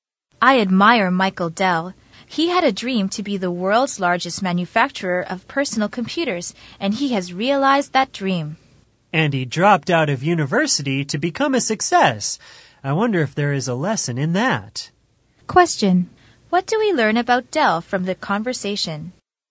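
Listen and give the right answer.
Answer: He dropped out of university and realized his dream of becoming the world's largest PC manufacturer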